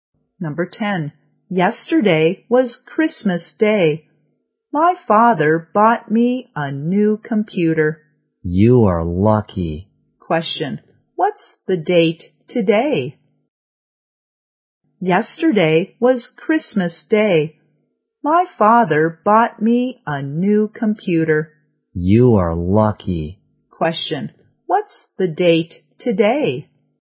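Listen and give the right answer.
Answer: December 26th.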